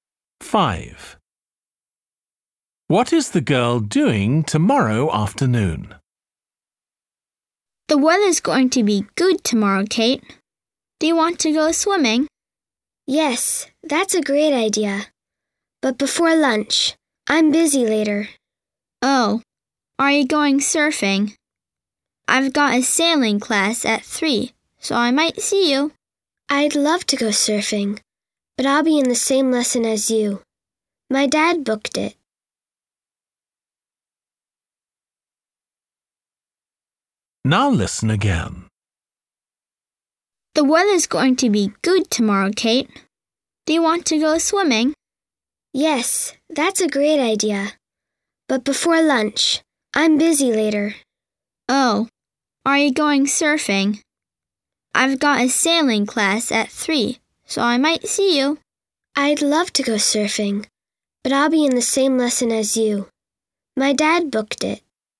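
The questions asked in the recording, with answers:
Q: What is the girl doing tomorrow afternoon?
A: a sailing class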